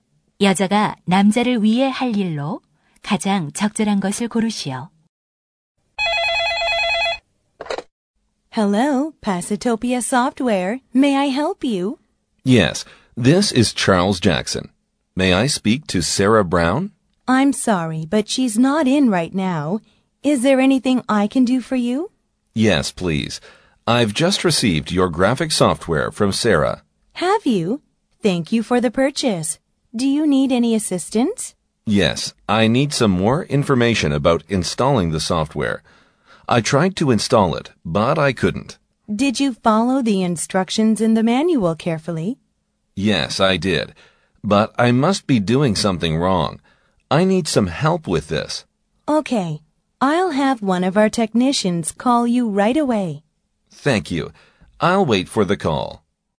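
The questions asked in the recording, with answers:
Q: 대화를 듣고 여자가 남자를 위해 할 일로 가장 적절한 것을 고르시오.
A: 기술자가 남자에게 전화하도록 하기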